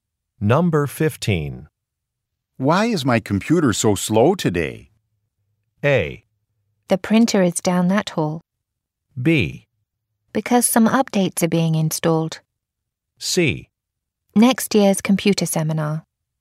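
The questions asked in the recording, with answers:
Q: Why is my computer so slow today?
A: B: Because some updates are being installed.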